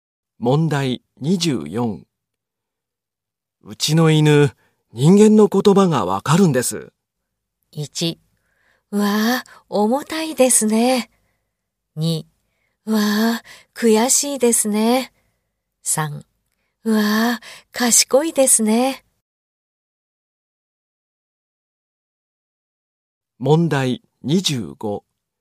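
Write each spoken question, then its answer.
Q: うちの犬、人間の言葉がわかるんです。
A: 3: うわぁ、賢いですね。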